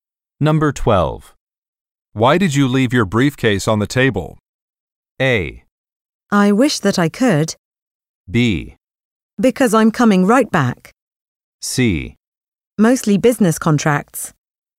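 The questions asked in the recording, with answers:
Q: Why did you leave your briefcase on the table?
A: B: Because I'm coming right back.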